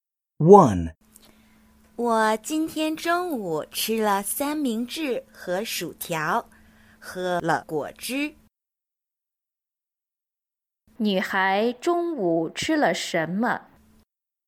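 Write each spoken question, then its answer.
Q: 女孩中午吃了什么?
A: 三明治和薯条,还喝了果汁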